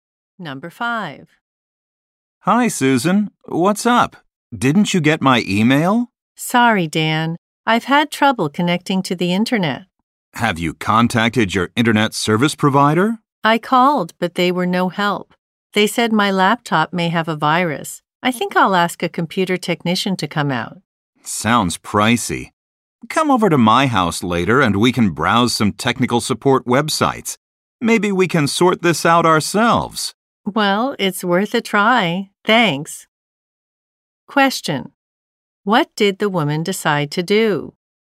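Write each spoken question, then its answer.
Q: What did the woman decide to do?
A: Go to Dan's house to try to fix the problem herself using technical support websites.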